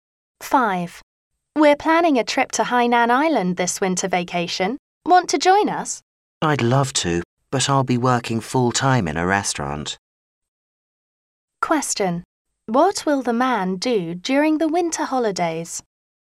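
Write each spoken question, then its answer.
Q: What will the man do during the winter holidays?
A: Work full-time in a restaurant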